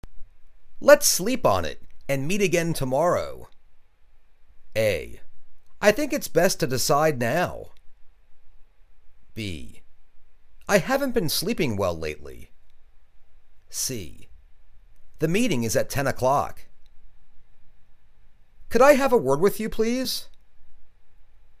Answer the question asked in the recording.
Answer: I think it's best to decide now.